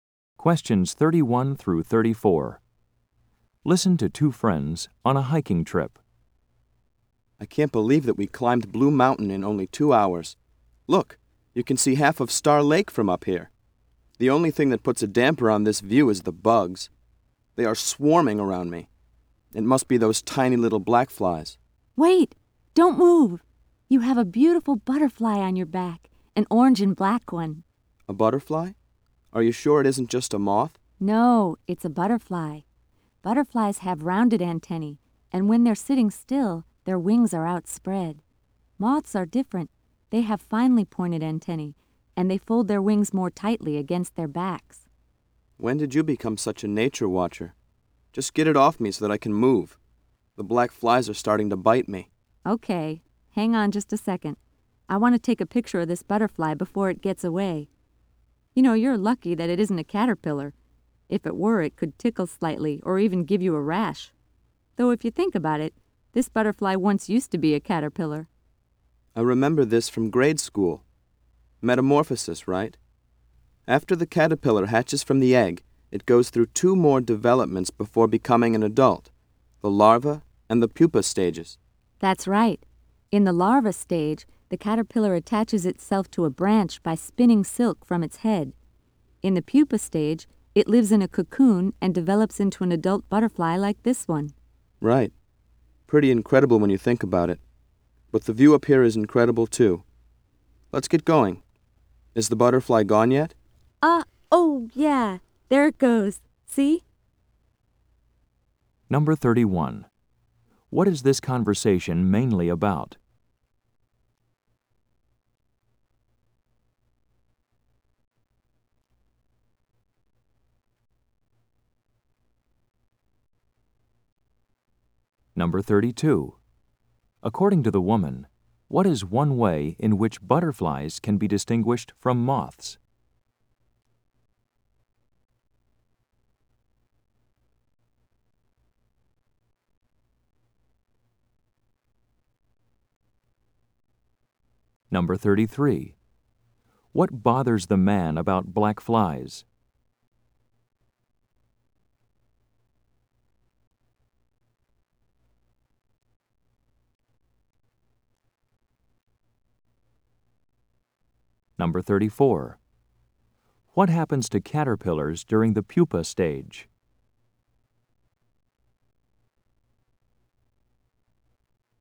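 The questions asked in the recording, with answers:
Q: According to the woman, what is one way in which butterflies can be distinguished from moths?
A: Butterflies have rounded antennae (and spread their wings when still)

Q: What bothers the man about black flies?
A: They swarm around him and bite him

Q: What happens to caterpillars during the pupa stage?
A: They live in a cocoon and develop into adult butterflies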